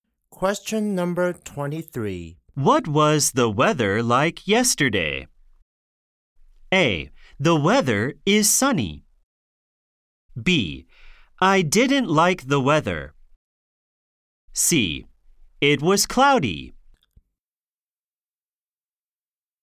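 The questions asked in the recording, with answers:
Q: What was the weather like yesterday?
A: C: It was cloudy.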